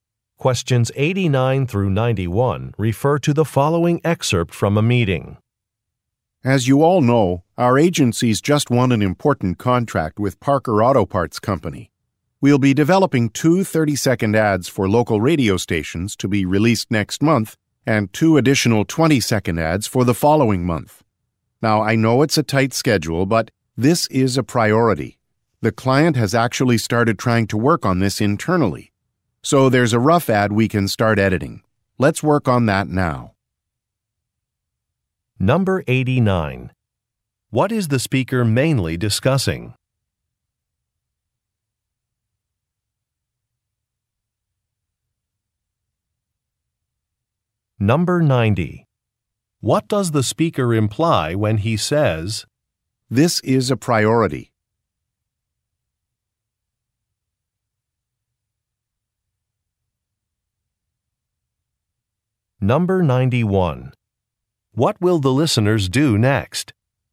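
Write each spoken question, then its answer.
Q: What is the speaker mainly discussing?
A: A new contract to make radio ads for Parker Auto Parts

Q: What will the listeners do next?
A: Start editing a rough ad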